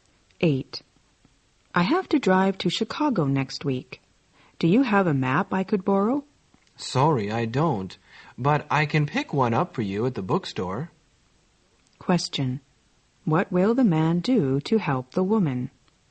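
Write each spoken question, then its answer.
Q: What will the man do to help the woman?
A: Buy her a map at the bookstore.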